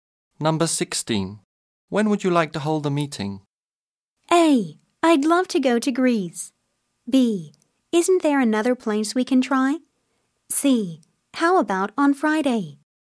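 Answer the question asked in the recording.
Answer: C: How about on Friday?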